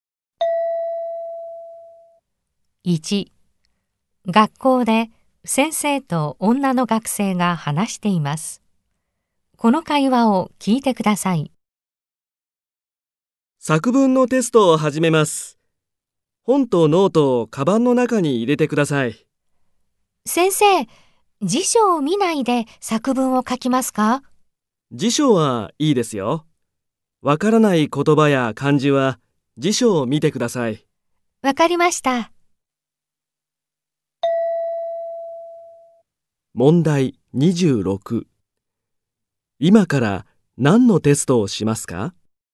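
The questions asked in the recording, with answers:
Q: 今から何のテストをしますか?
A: 作文のテスト

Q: 何を見ながらテストをしますか?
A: 辞書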